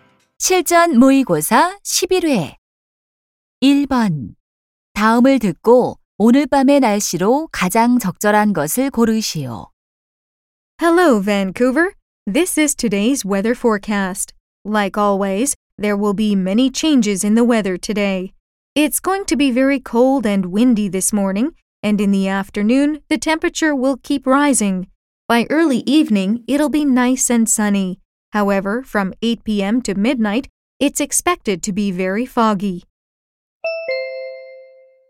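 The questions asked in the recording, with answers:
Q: 다음을 듣고 오늘 밤의 날씨로 가장 적절한 것을 고르시오.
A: 안개가 많이 낌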